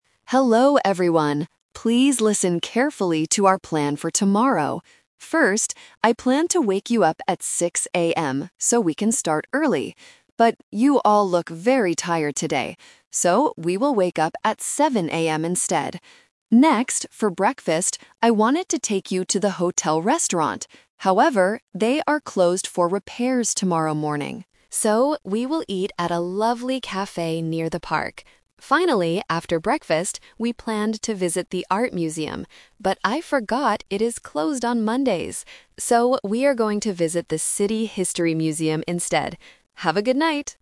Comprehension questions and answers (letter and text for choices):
Listen to the tour guide's announcement and choose the correct answer (A, B, or C) for each question.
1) What time will the tourists wake up tomorrow?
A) At 6:00 AM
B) At 7:00 AM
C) At 8:00 AM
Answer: B) At 7:00 AM

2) Where will they eat breakfast?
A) At the hotel restaurant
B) At a lovely cafe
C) On the bus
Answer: B) At a lovely cafe

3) Which museum are they going to visit?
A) The Art Museum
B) The City History Museum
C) The Science Museum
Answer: B) The City History Museum

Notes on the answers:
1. The tour guide says he planned to wake them up at 6:00 AM (The Trap). However, because everyone is tired, he changes the time. He uses "So" to give the final plan: "we will wake up at 7:00 AM instead." 8:00 AM is not mentioned.
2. The guide wanted to take them to the hotel restaurant (The Trap). But it is closed for repairs. He states his final decision by saying, "So, we will eat at a lovely cafe near the park." Eating on the bus is not mentioned in the audio.
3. The guide mentions that they planned to visit the Art Museum (The Trap). However, he realizes it is closed on Mondays. His final plan is: "So, we are going to visit the City History Museum instead." The Science Museum is not mentioned.

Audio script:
Tour Guide: Hello everyone! Please listen carefully to our plan for tomorrow. First, I planned to wake you up at 6:00 AM so we can start early. But, you all look very tired today.
Next, for breakfast, I wanted to take you to the hotel restaurant. However, they are closed for repairs tomorrow morning. So, we will eat at a lovely cafe near the park.
Finally, after breakfast, we planned to visit the Art Museum. But I forgot it is closed on Mondays!

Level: A2